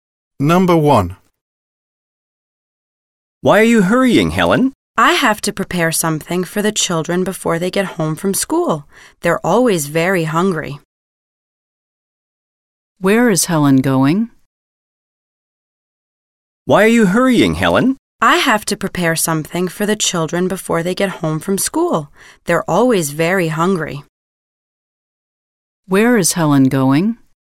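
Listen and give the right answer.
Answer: Home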